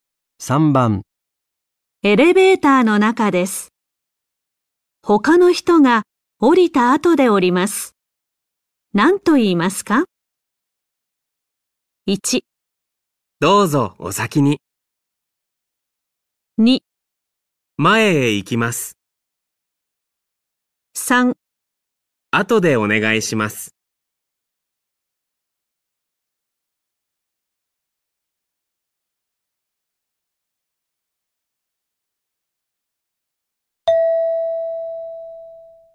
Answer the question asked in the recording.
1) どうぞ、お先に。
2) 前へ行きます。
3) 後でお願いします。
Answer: 1) どうぞ、お先に。

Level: N4 Listening · Test 1